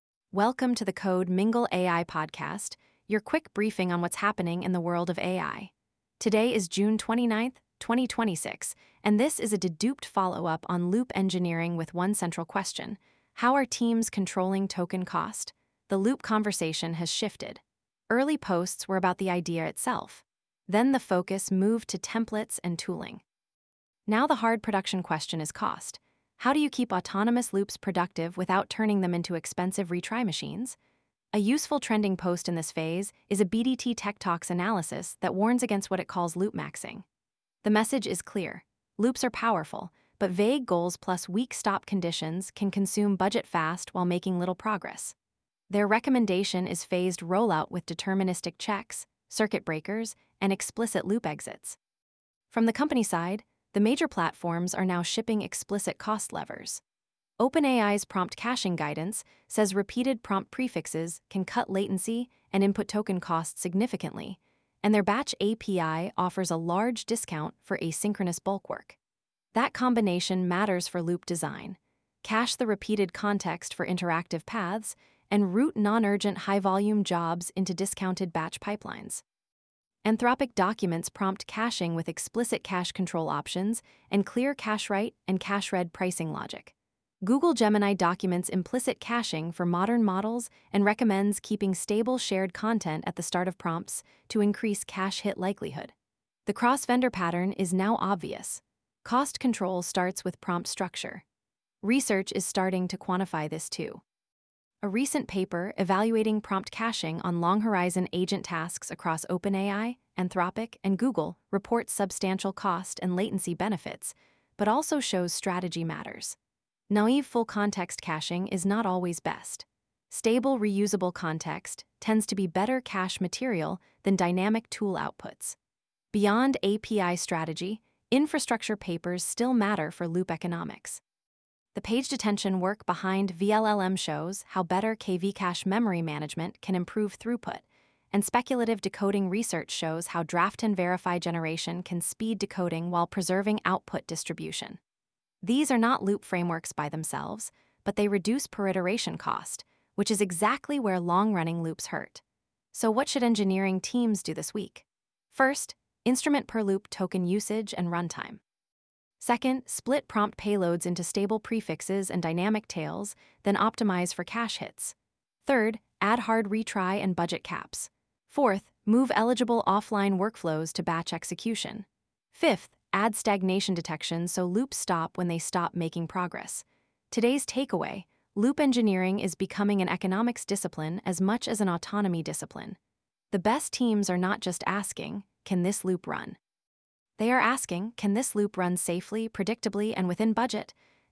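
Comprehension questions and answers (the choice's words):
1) What is the core June 29 deduped angle for loop engineering?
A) Token-cost control and economic reliability for autonomous loops.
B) Re-explaining the basic loop definition only.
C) Ignoring budgets in favor of more retries.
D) Using one-shot prompts for everything.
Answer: Token-cost control and economic reliability for autonomous loops.

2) What does OpenAI claim Prompt Caching can improve?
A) Lower latency and lower input-token costs on repeated prefixes.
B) Guaranteed correctness of every loop.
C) Elimination of all model failures.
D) Unlimited context without tradeoffs.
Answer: Lower latency and lower input-token costs on repeated prefixes.

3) What did the 'Don't Break the Cache' paper find?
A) Prompt caching can significantly reduce cost and improve latency in long-horizon agent tasks.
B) Caching has no effect on agent workloads.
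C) Only full-context caching is ever optimal.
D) Dynamic tool results should always be cached.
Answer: Prompt caching can significantly reduce cost and improve latency in long-horizon agent tasks.

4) Why are deterministic exit conditions critical for loop cost?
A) They prevent endless retries on vague goals and cap runaway token spend.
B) They remove the need for testing.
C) They make batching unnecessary.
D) They guarantee zero latency.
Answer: They prevent endless retries on vague goals and cap runaway token spend.

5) What is a practical first step for a team with expensive loops?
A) Instrument per-loop token usage, runtime, and cache hit rates before scaling autonomy.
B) Increase retry count indefinitely.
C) Disable all guardrails.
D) Treat cost as an afterthought.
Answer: Instrument per-loop token usage, runtime, and cache hit rates before scaling autonomy.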